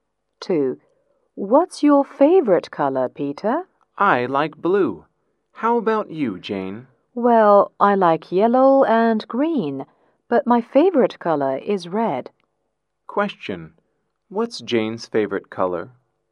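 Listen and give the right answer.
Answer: Red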